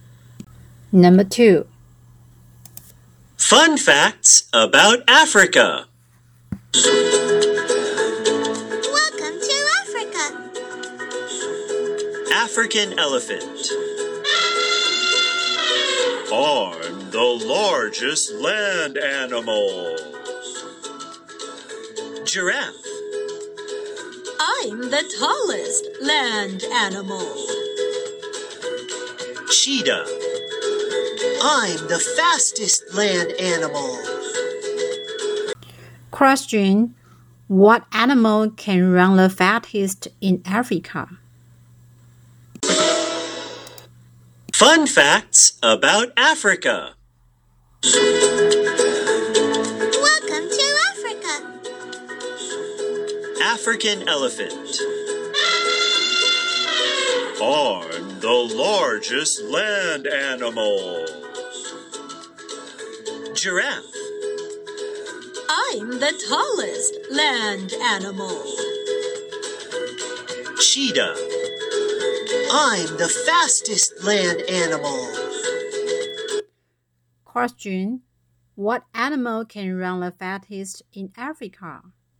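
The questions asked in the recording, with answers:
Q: Question. What animal can run the fastest in Africa?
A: The cheetah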